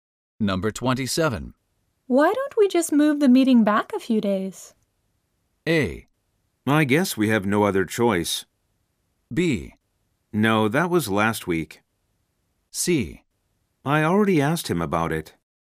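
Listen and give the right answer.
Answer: A: I guess we have no other choice.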